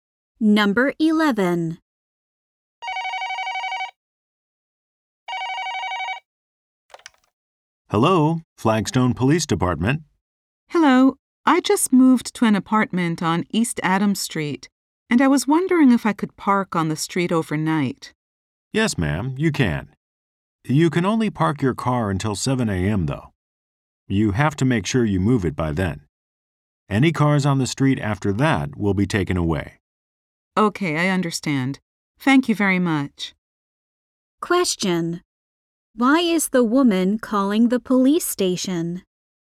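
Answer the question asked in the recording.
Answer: To ask if she can park on the street overnight.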